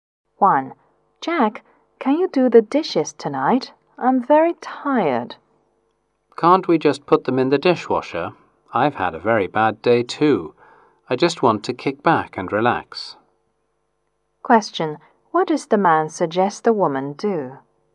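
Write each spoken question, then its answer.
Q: What does the man suggest the woman do?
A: Put the dishes in the dishwasher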